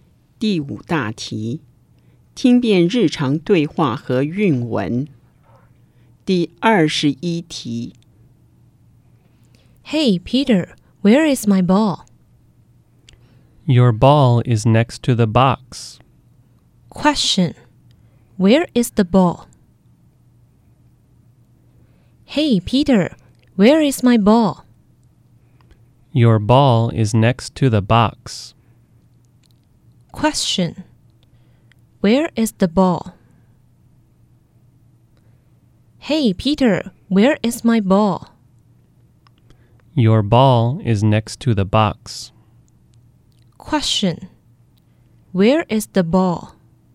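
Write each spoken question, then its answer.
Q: Question, where is the ball?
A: Next to the box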